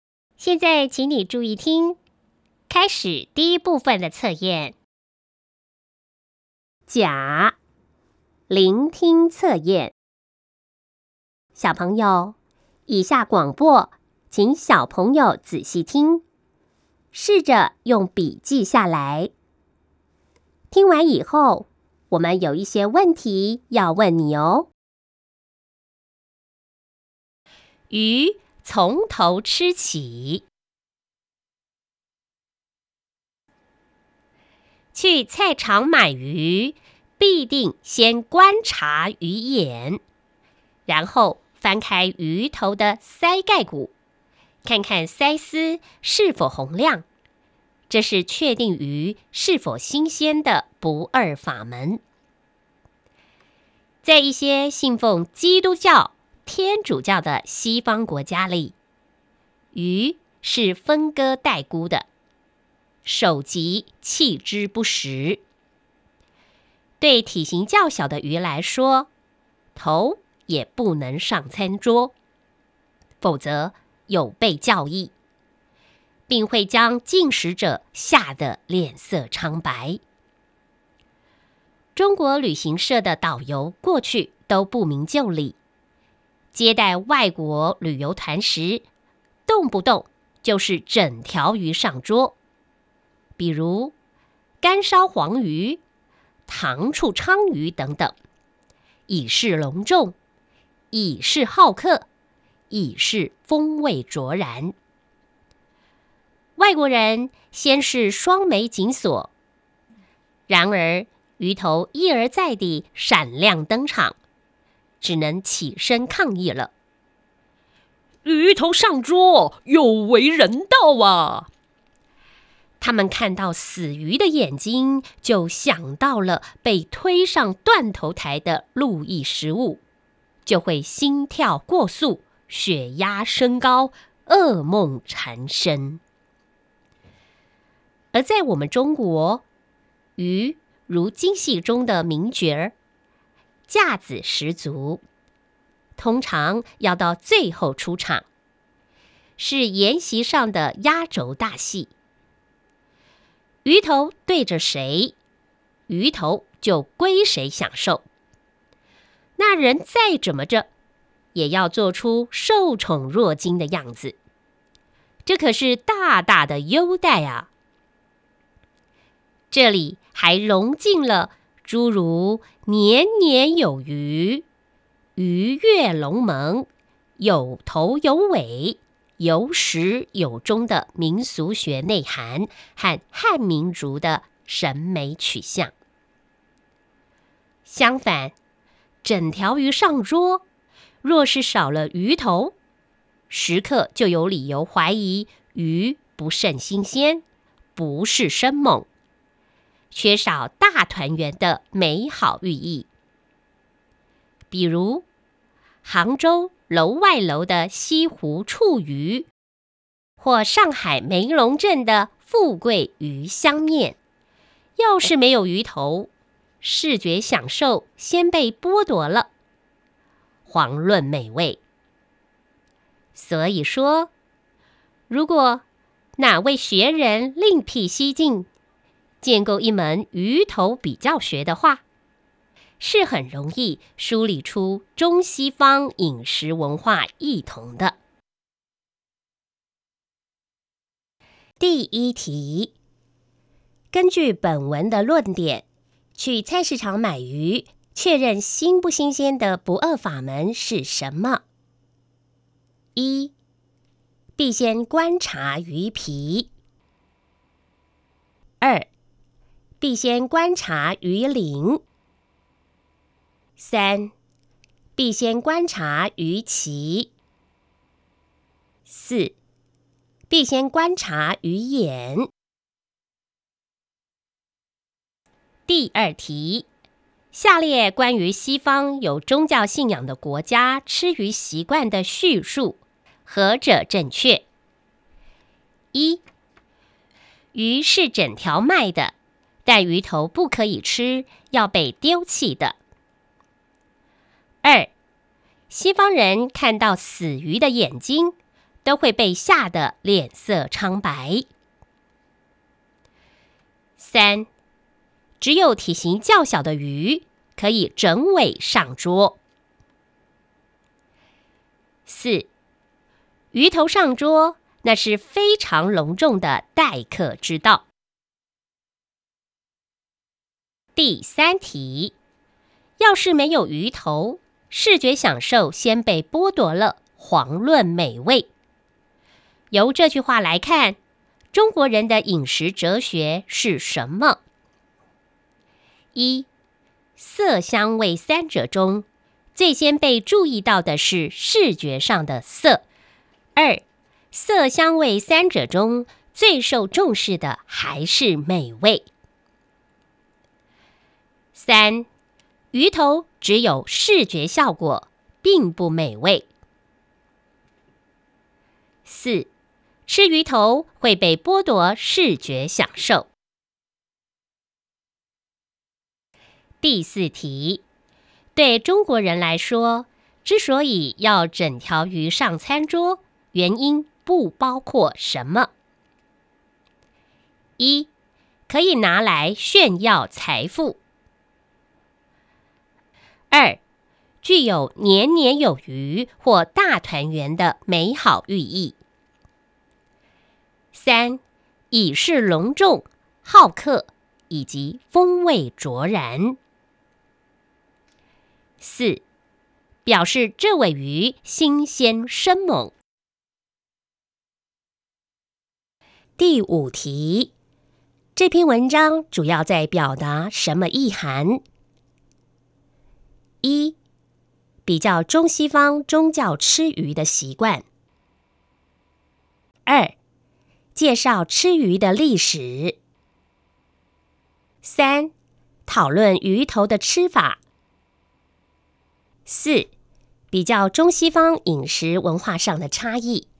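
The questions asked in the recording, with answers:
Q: 根据本文的论点,去菜市场买鱼,确认新不新鲜的不二法门是什么?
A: 四: 必先观察鱼眼

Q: 要是没有鱼头,视觉享受先被剥夺了,遑论美味。 由这句话来看,中国人的饮食哲学是什么?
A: 一: 色香味三者中,最先被注意到的是视觉上的色

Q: 对中国人来说,之所以要整条鱼上餐桌,原因不包括什么?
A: 一: 可以拿来炫耀财富

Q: 这篇文章主要在表达什么意涵?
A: 四: 比较中西方饮食文化上的差异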